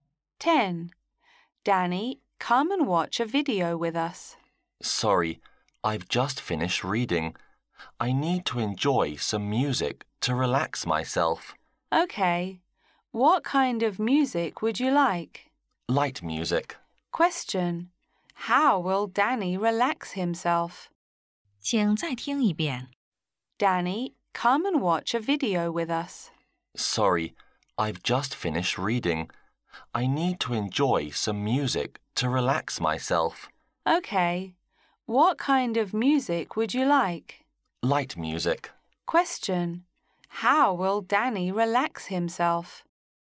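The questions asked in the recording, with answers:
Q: How will Danny relax himself?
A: By listening to light music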